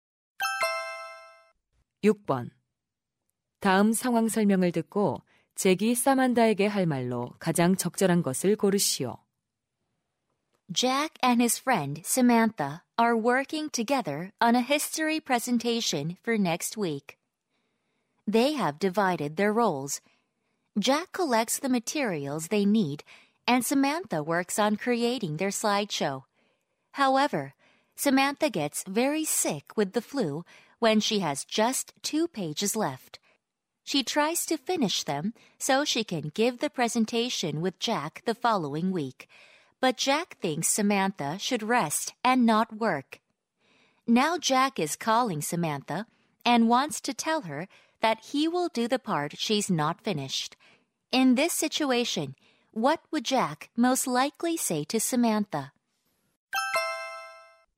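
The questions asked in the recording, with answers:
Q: In this situation, what would Jack most likely say to Samantha?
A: Just rest. I'll finish the part you haven't done.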